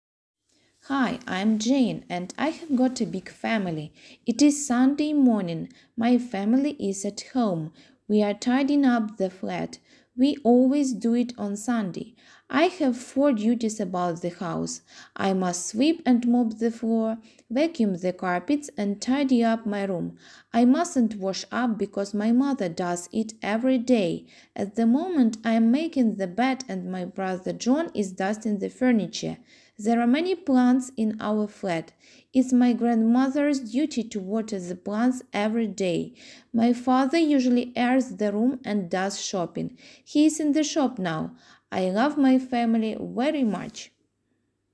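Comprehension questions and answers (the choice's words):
Listen to the text and match the questions with the answers.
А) He is in the shop now.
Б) She waters the plants every day.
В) The girl's name is Jane.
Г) She is making the bed at the moment.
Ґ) She has got four duties about the house.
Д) The family tidies up the flat on Sunday.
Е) He usually airs the room and does shopping.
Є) Her mother does.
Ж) He is dusting the furniture.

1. What is the girl's name?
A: The girl's name is Jane.

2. When does the family tidy up the flat?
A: The family tidies up the flat on Sunday.

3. How many duties has Jane got about the house?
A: She has got four duties about the house.

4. Who washes up in the family?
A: Her mother does.

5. What is Jane doing at the moment?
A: She is making the bed at the moment.

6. What is John doing?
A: He is dusting the furniture.

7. What does grandmother do about the house?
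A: She waters the plants every day.

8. What are the father's duties?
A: He usually airs the room and does shopping.

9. Where is the father now?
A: He is in the shop now.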